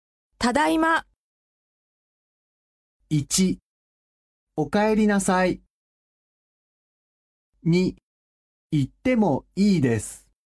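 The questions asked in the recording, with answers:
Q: ただいま。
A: 1: おかえりなさい。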